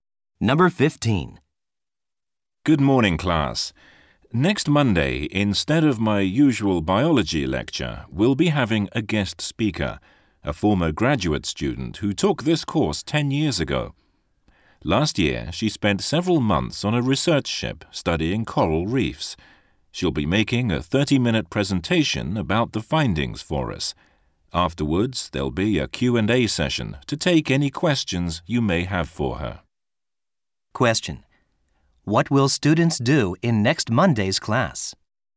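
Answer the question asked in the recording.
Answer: Listen to a guest speaker's presentation on coral reefs and ask her questions.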